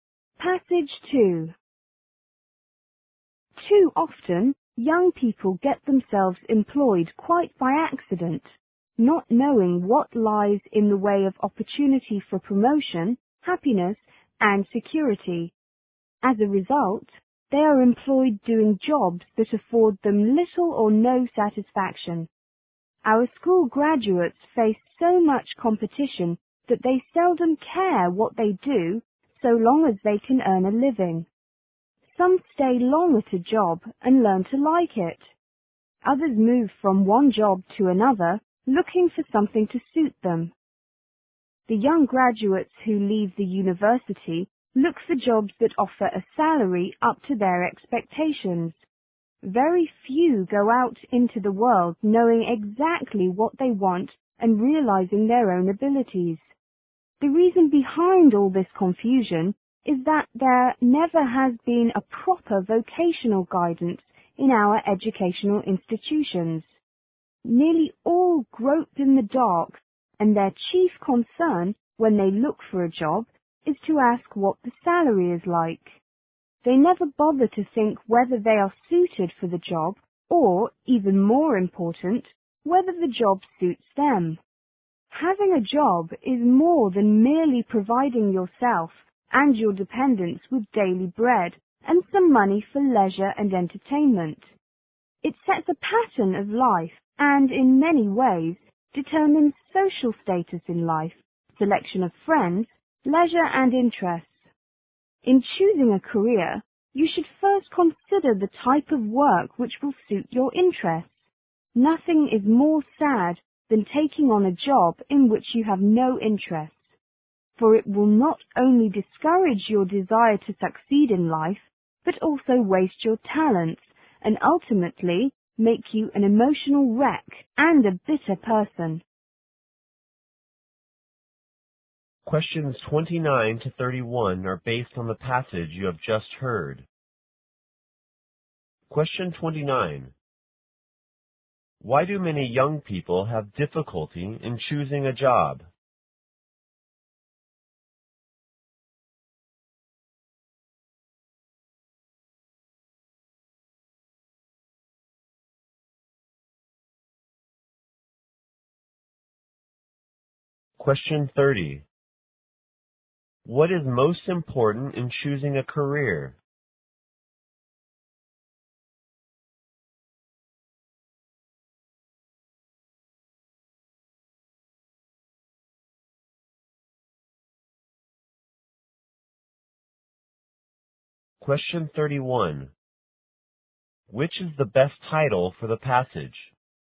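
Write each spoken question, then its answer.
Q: Why do many young people have difficulty in choosing a job?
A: There is no proper vocational guidance in schools.

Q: What is most important in choosing a career?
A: Choosing work that suits your interests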